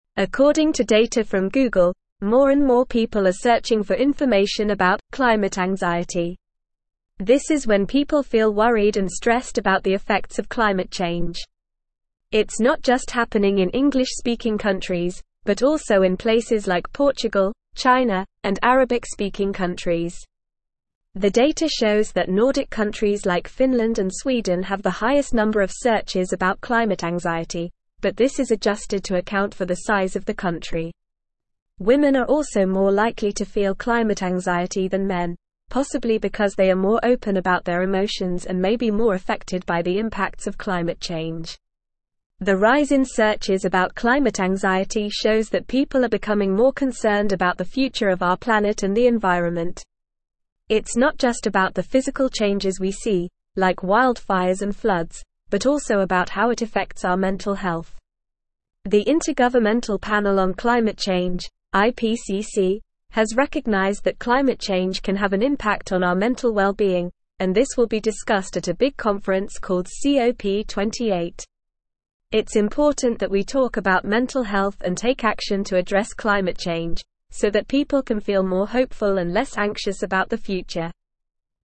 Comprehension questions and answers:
Listen and Fill in the Gaps:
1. According to data from (1)______, more and more people are searching for information about "(2)______ (3)______."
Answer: Google

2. According to data from (1)______, more and more people are searching for information about "(2)______ (3)______."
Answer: climate

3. According to data from (1)______, more and more people are searching for information about "(2)______ (3)______."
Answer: anxiety

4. This is when people feel worried and stressed about the (4)______ of climate change.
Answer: effects

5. The data shows that Nordic countries like (5)______ and Sweden have the highest (6)______ of searches about climate anxiety, but this is adjusted to (7)______ for the size of the (8)______.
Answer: Finland

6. The data shows that Nordic countries like (5)______ and Sweden have the highest (6)______ of searches about climate anxiety, but this is adjusted to (7)______ for the size of the (8)______.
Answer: number

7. The data shows that Nordic countries like (5)______ and Sweden have the highest (6)______ of searches about climate anxiety, but this is adjusted to (7)______ for the size of the (8)______.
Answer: account

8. The data shows that Nordic countries like (5)______ and Sweden have the highest (6)______ of searches about climate anxiety, but this is adjusted to (7)______ for the size of the (8)______.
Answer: country

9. The rise in searches about climate anxiety shows that people are becoming more concerned about the (9)______ of our planet and the environment.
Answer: future

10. It's not just about the physical changes we see, like wildfires and (10)______, but also about how it affects our mental (11)______.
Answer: floods

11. It's not just about the physical changes we see, like wildfires and (10)______, but also about how it affects our mental (11)______.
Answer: health

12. The Intergovernmental (12)______ on Climate Change (IPCC) has recognized that climate change can have an impact on our (13)______ well-being, and this will be discussed at a big conference (14)______ COP28.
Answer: Panel

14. The Intergovernmental (12)______ on Climate Change (IPCC) has recognized that climate change can have an impact on our (13)______ well-being, and this will be discussed at a big conference (14)______ COP28.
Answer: called

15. It's important that we talk about mental health and take action to (15)______ climate change, so that (16)______ can feel more hopeful and less anxious about the future.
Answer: address

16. It's important that we talk about mental health and take action to (15)______ climate change, so that (16)______ can feel more hopeful and less anxious about the future.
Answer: people

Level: Level 3